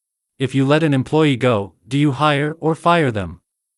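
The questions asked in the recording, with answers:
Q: If you let an employee go, do you hire or fire them?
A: fire them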